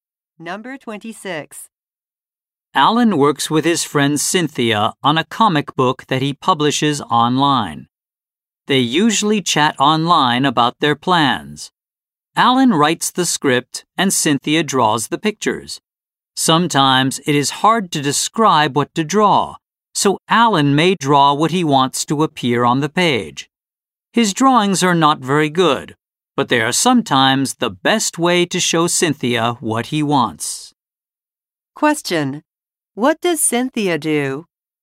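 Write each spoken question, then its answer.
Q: What does Cynthia do?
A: She draws the pictures for the comic book.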